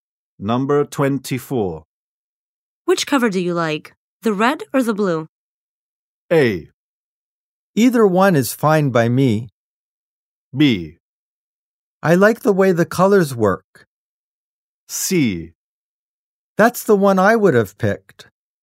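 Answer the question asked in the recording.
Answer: A: Either one is fine by me.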